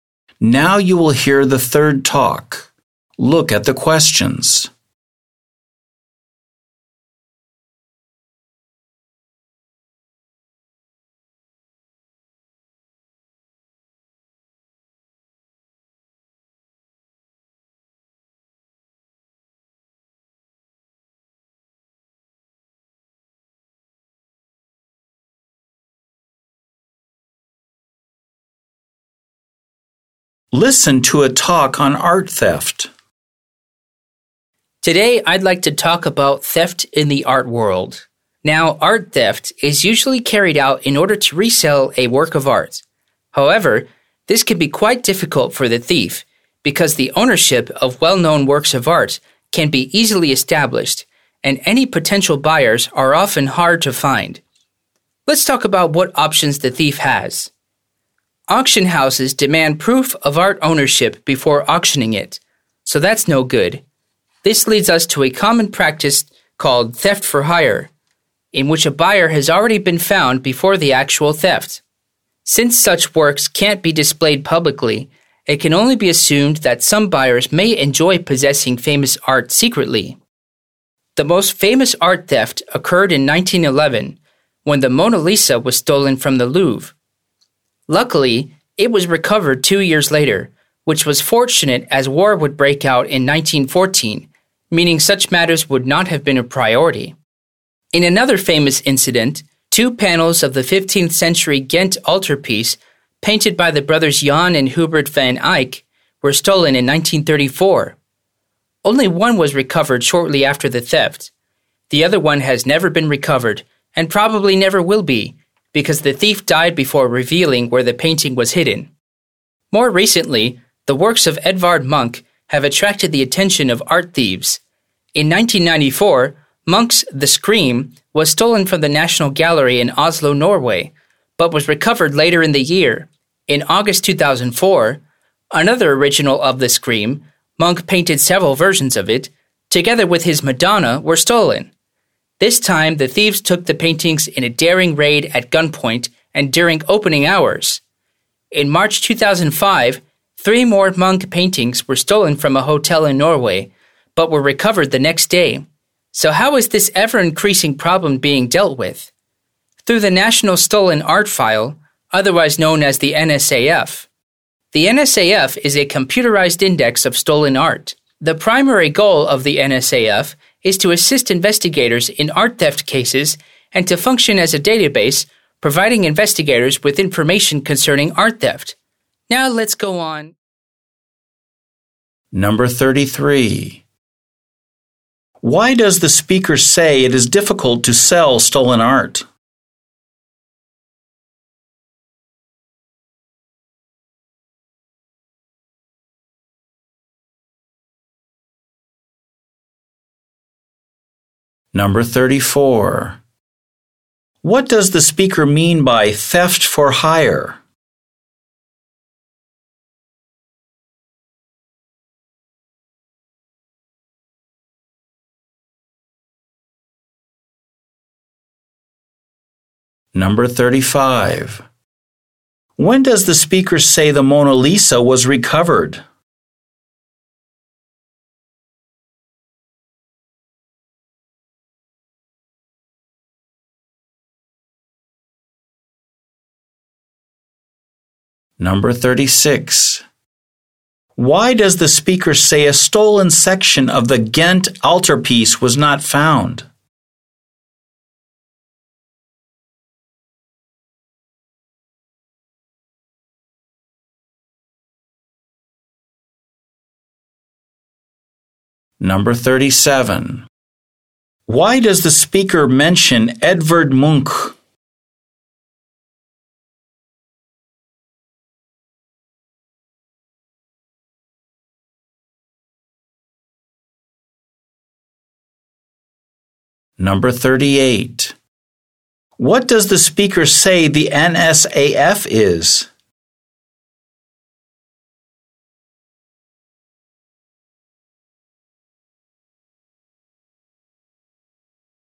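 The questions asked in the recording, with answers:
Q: Why does the speaker say it is difficult to sell stolen art?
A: Ownership is easily established and buyers are hard to find

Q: What does the speaker mean by theft for hire?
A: A buyer has been found before the theft

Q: When does the speaker say the Mona Lisa was recovered?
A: Two years later, in 1913, before the war

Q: Why does the speaker say a stolen section of the Ghent altarpiece was not found?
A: The thief died before revealing where it was hidden

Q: Why does the speaker mention Edvard Munch?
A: His works have recently been targeted by art thieves

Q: What does the speaker say the NSAF is?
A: A computerized index of stolen art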